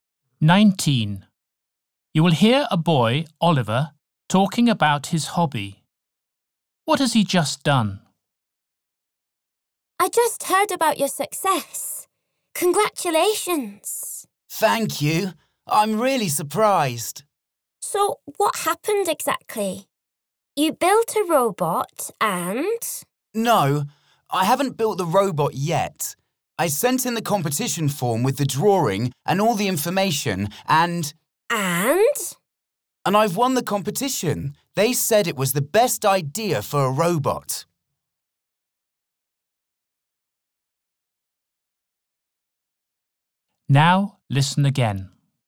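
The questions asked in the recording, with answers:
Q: What has he just done?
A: Won a competition for the best robot idea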